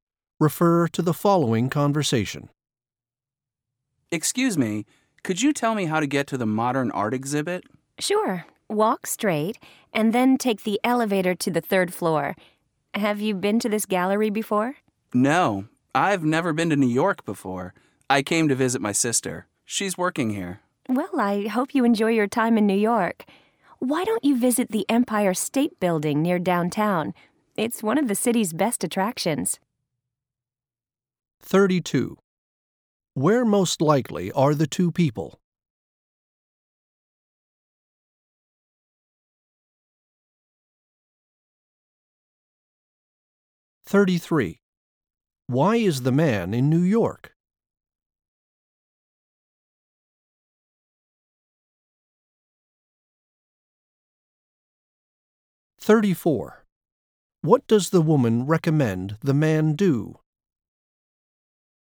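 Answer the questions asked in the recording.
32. At an art gallery
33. To visit his sister
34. Visit the Empire State Building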